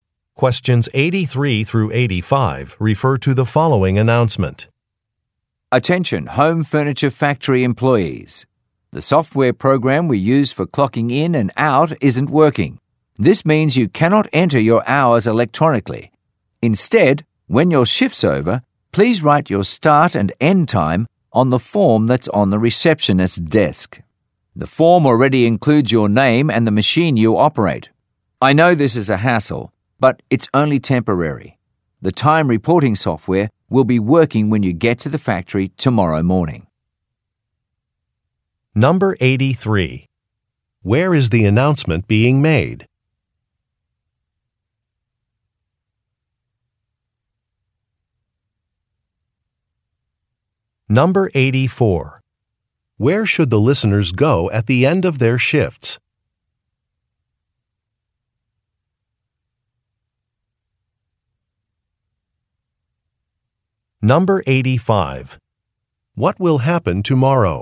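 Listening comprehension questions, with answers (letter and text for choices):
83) Where is the announcement being made?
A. At a technology firm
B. At a repair shop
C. At a factory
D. At a law office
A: C. At a factory

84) Where should the listeners go at the end of their shifts?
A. To the company cafeteria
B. To the receptionist's desk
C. To the locker room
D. To the parking area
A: B. To the receptionist's desk

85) What will happen tomorrow?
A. Some office furniture will be delivered.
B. New board members will be elected.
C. A city official will conduct an inspection.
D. Some time-reporting software will be fixed.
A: D. Some time-reporting software will be fixed.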